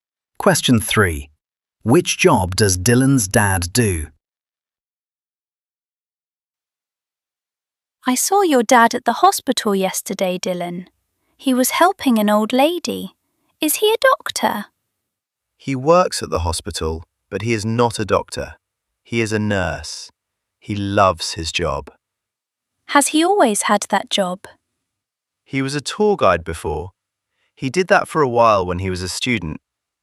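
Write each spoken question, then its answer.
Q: Which job does Dylan's dad do?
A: Nurse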